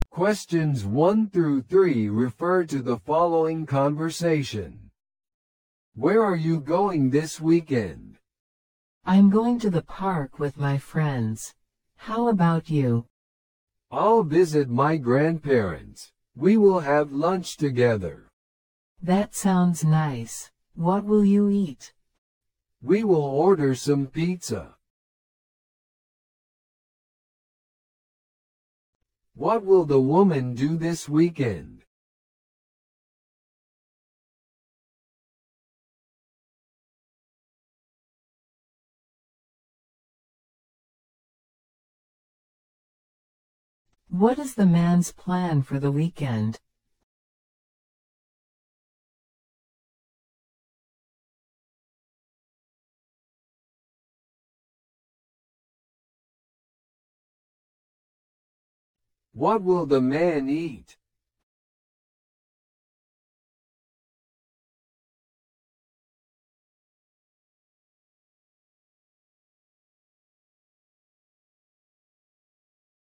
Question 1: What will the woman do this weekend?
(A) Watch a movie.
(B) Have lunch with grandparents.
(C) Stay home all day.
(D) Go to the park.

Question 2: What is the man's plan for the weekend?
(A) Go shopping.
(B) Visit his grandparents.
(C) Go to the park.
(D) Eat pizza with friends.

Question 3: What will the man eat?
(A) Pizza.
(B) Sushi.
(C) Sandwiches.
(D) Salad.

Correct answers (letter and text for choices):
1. (D) Go to the park.
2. (B) Visit his grandparents.
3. (A) Pizza.

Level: 初級者用